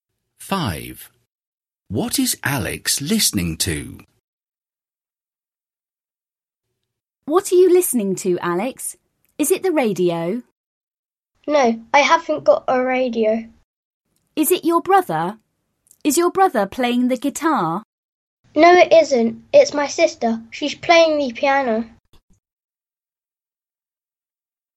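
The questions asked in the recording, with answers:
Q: What is Alex listening to?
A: his sister playing the piano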